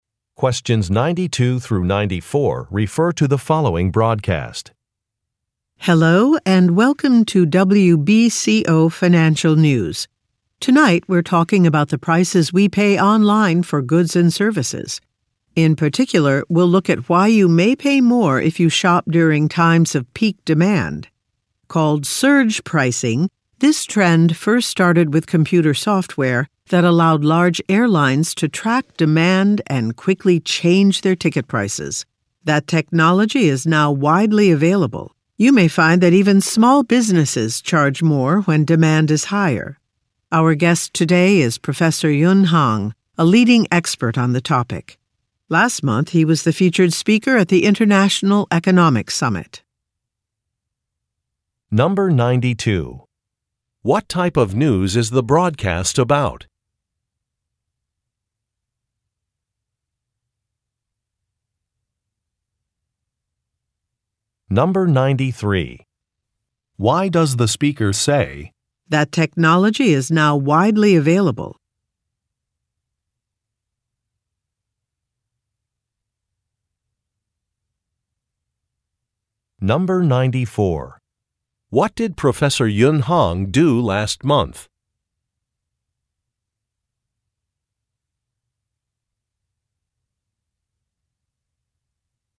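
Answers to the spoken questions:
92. Financial news
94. He was the featured speaker at the International Economic Summit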